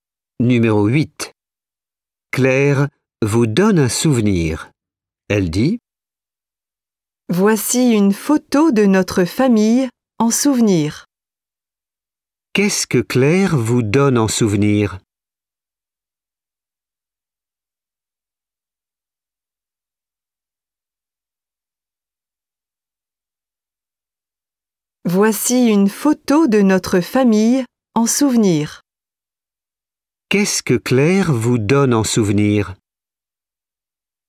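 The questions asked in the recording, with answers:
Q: Qu'est-ce que Claire vous donne en souvenir?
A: Une photo de sa famille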